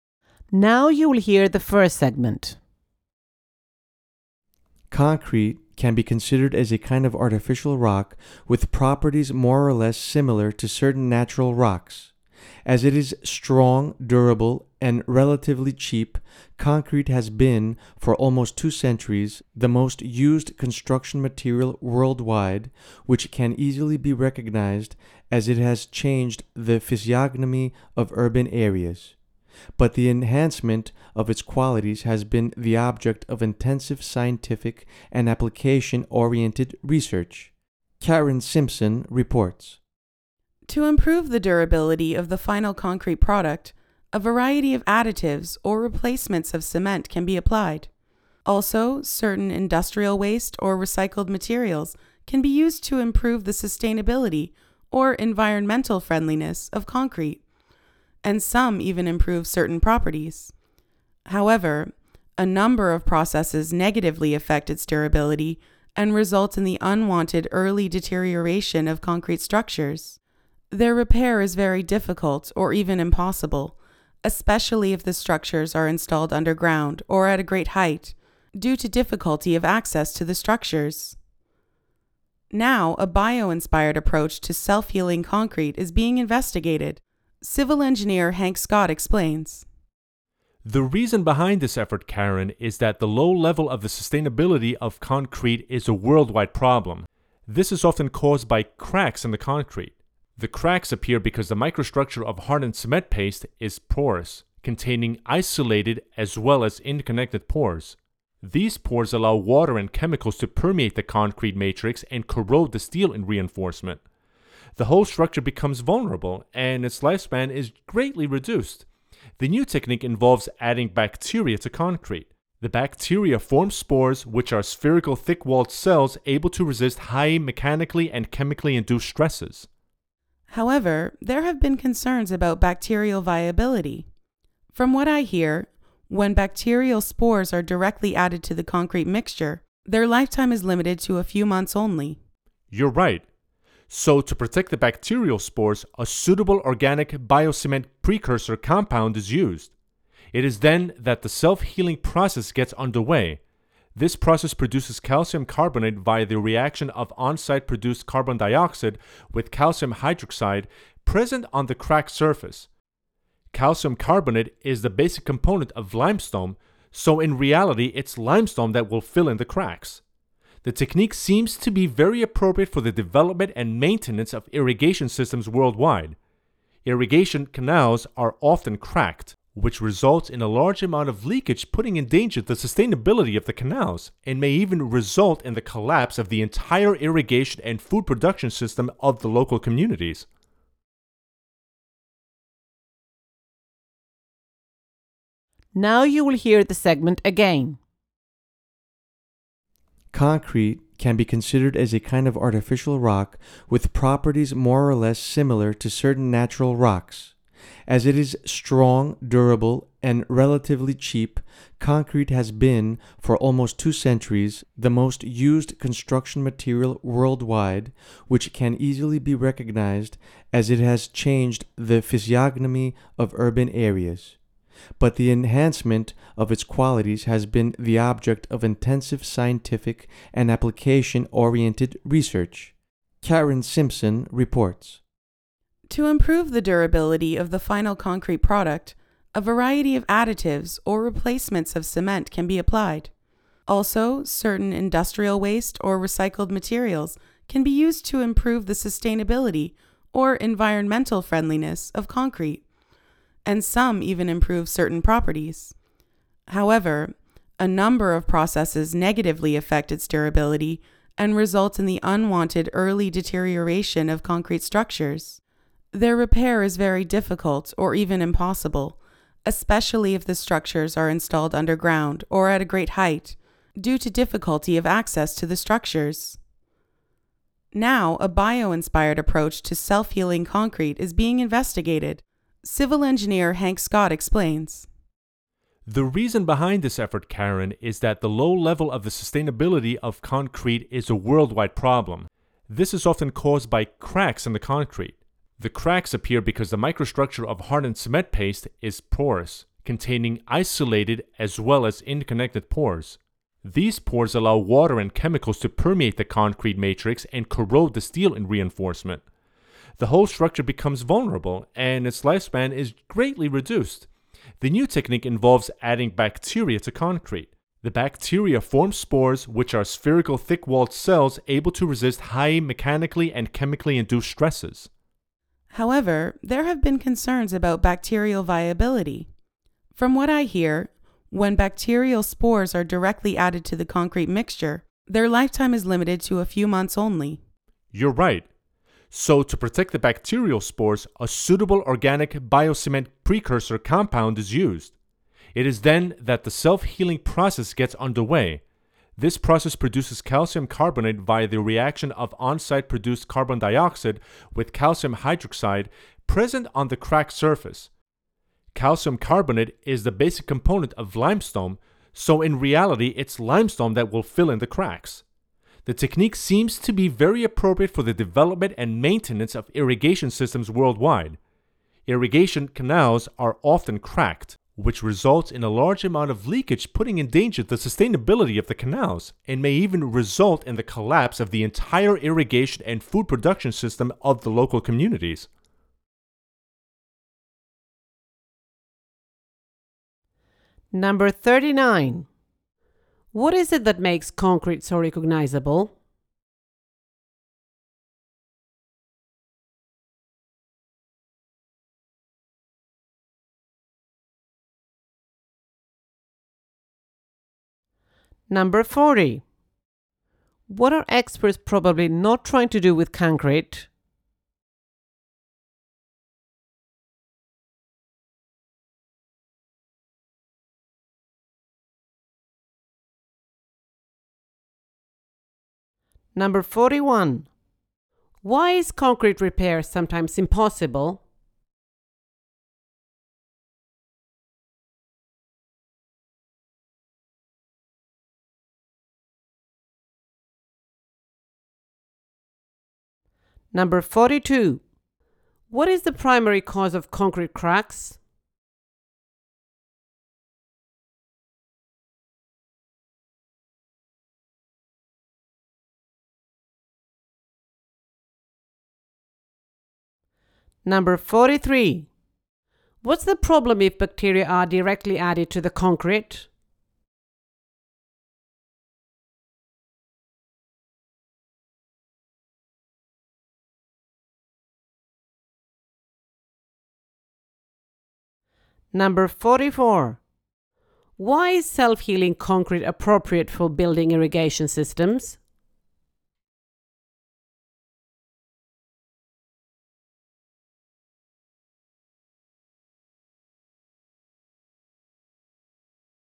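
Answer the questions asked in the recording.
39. It has changed the physiognomy of urban areas
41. Structures underground or at great height are difficult to access
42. The porous microstructure of hardened cement paste
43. Their lifetime is limited to a few months
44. Irrigation canals often crack and leak, which can lead to collapse of the system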